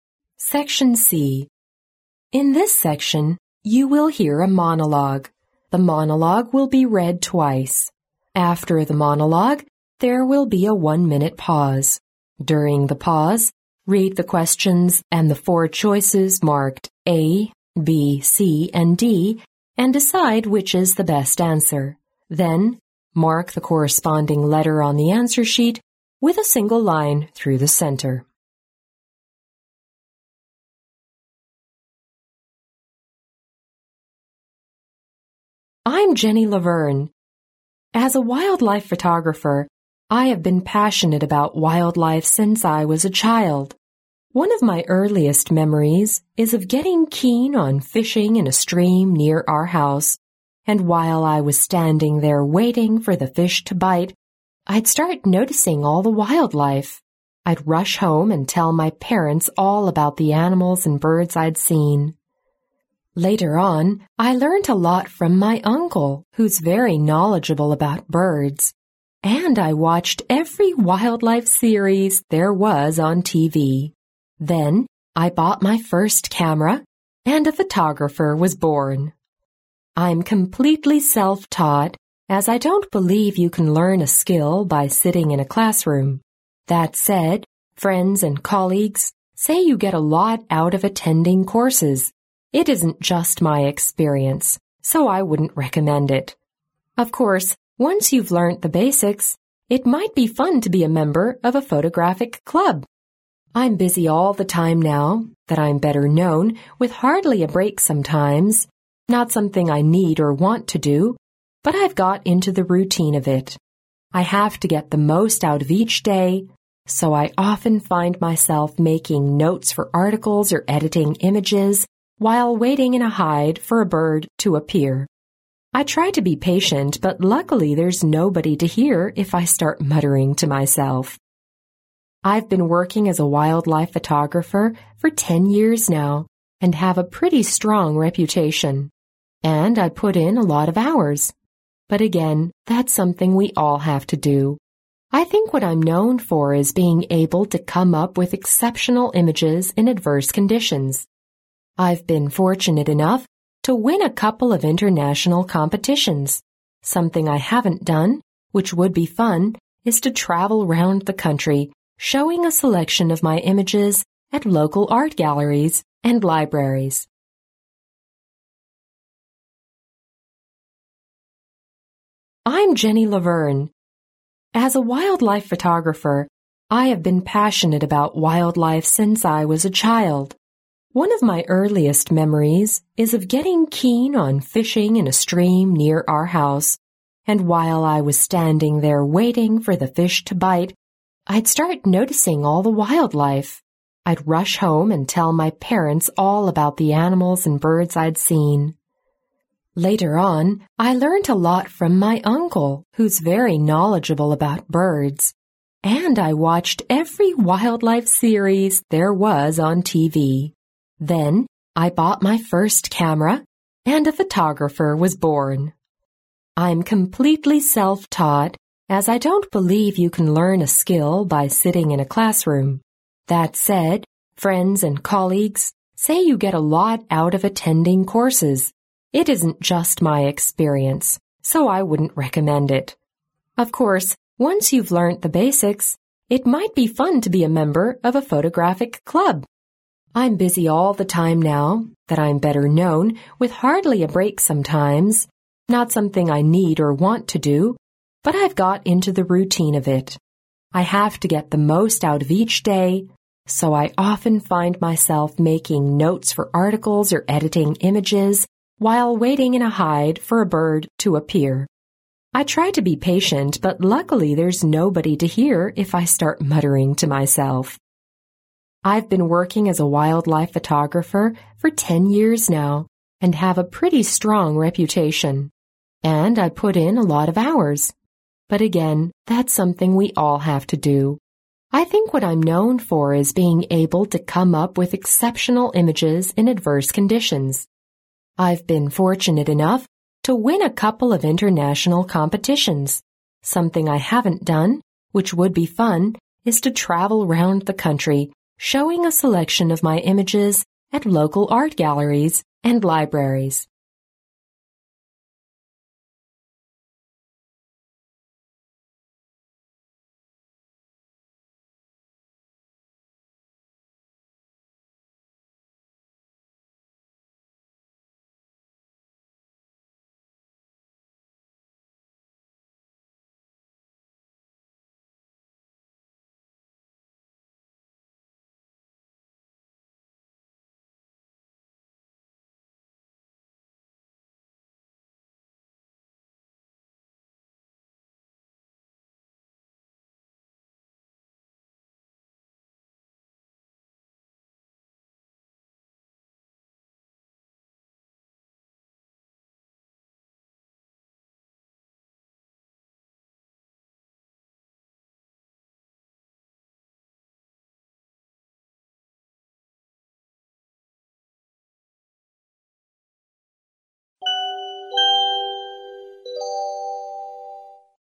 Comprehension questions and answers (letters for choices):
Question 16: What was Jenny fond of doing as a child?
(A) Taking photos.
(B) Listening to her uncle's stories.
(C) Fishing in a nearby stream.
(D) Watching various TV programmes.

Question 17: How did Jenny learn photo-taking?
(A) She took a course.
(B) She was self-taught.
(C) She learned from a friend.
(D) She joined a club.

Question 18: What did Jenny imply about time?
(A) She had wasted a lot in her childhood.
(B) She wished she had made better use of it.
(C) She could never have enough of it.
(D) She didn't realize its importance until very late.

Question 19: What does Jenny say she is known for?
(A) Her devotion to the study of animal behavior.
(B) Her unique understanding of photography.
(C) Her patience to observe wildlife.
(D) Her excellent photos taken in adverse conditions.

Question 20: What is Jenny hoping to do in the future?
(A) Publish a book of her best pictures.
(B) Display her photos while travelling.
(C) Gain international recognition.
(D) Win an award in an international photo competition.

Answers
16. C
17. B
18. C
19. D
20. B

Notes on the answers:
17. 新闻内容中Jenny说"I'm completely self-taught",即她是自学摄影,因此选B。

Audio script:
In this section, you will hear a monologue. The monologue will be read twice. After the monologue, there will be a one-minute pause. During the pause, read the questions and the four choices marked A, B, C and D, and decide which is the best answer. Then mark the corresponding letter on the answer sheet with a single line through the centre.
16 What was Jenny fond of doing as a child?
As a wildlife photographer, I have been passionate about wildlife since I was a child. One of my earliest memories is of getting keen on fishing in a stream near our house, and while I was standing there waiting for the fish to bite, I'd start noticing all the wildlife. I'd rush home and tell my parents all about the animals and birds I'd seen. Later on I learnt a lot from my uncle, who's very knowledgeable about birds, and I watched every wildlife series there was on TV. Then I bought my first camera, and a photographer was born!
【录音原文】 I'm completely self-taught, as I don't believe you can learn a skill by sitting in a classroom. That said, friends and colleagues say you get a lot out of attending courses—it isn't just my experience, so I wouldn't recommend it. Of course, once you've learnt the basics, it might be fun to be a member of a photographic club.
【解析】 新闻录音中Jenny谈到自己的日常生活时,说"I'm busy all the time now that I'm better known, with hardly a break sometimes, not something I need or want to do, but I've got into the routine of it.
I have to get the most out of each day, so I often find myself making notes for articles, or editing images, while waiting in a hide for a bird to appear. I try to be patient, but luckily there's nobody to hear if I start muttering to myself.
19 What does Jenny say she is known for?
【录音原文】 I've been working as a wildlife photographer for ten years now and have a pretty strong reputation. And I put in a lot of hours, but again, that's something we all have to do. I think what I'm known for is being able to come up with exceptional images in adverse conditions.
20 What is Jenny hoping to do in the future?
【录音原文】 I've been fortunate enough to win a couple of international competitions. Something I haven't done, which would be fun, is to travel round the country showing a selection of my images at local art galleries and libraries.
Section D (10 marks)